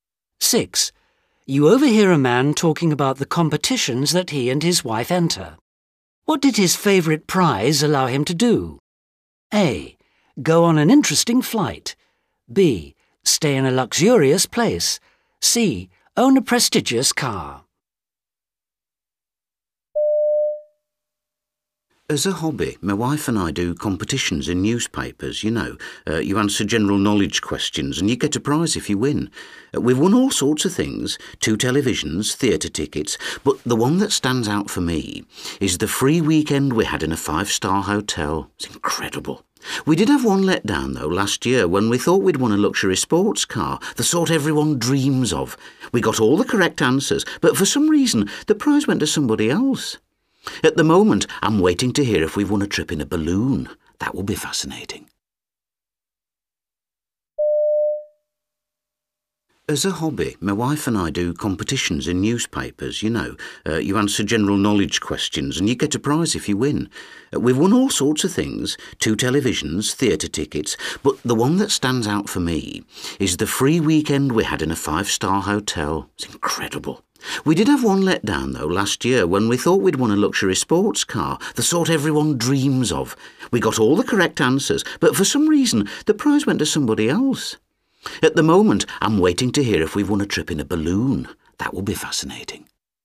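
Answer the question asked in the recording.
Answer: B: Stay in a luxurious place.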